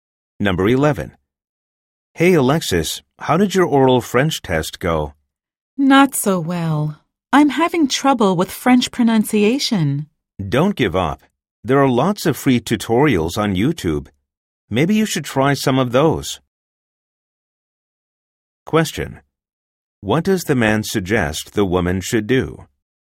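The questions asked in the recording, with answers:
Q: What does the man suggest the woman should do?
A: Try free French pronunciation tutorials on YouTube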